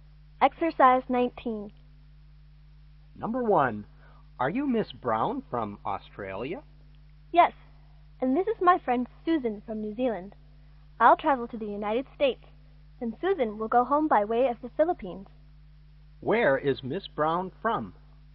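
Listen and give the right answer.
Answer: Australia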